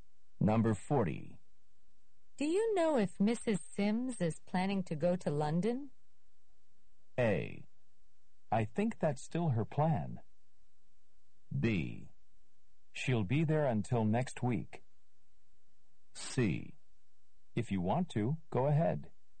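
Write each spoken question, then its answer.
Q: Do you know if Mrs. Sims is planning to go to London?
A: A: I think that's still her plan.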